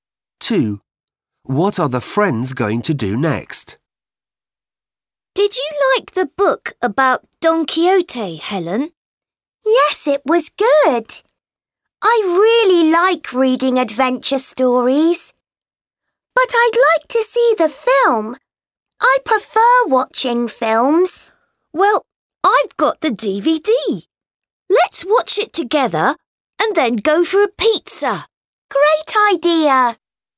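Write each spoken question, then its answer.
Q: What are the friends going to do next?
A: watch the film on DVD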